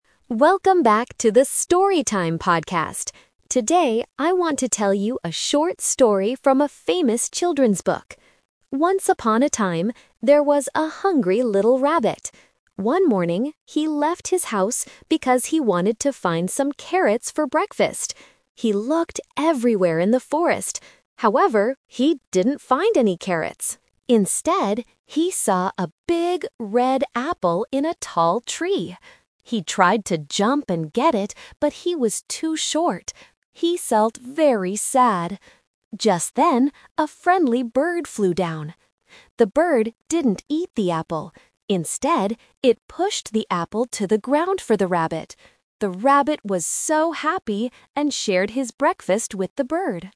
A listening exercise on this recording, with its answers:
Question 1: What food did the rabbit want to find at first?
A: A carrot

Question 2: Why couldn't the rabbit get the apple by himself?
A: Because he was too short.

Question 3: What did the bird do when it flew down?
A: It pushed the apple to the ground.

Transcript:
Today, I want to tell you a short story from a famous children's book.
Once upon a time, there was a hungry little rabbit. One morning, he left his house because he wanted to find some carrots for breakfast. He looked everywhere in the forest. However, he didn't find any carrots. Instead, he saw a big, red apple in a tall tree.
He tried to jump and get it, but he was too short. He felt very sad. Just then, a friendly bird flew down. The bird didn't eat the apple. Instead, it pushed the apple to the ground for the rabbit. The rabbit was so happy and shared his breakfast with the bird.

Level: A2